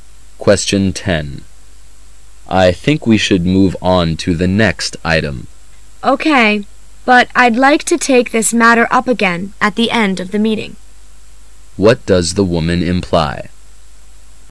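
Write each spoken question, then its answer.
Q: What does the woman imply?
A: She wants to discuss the matter again at the end of the meeting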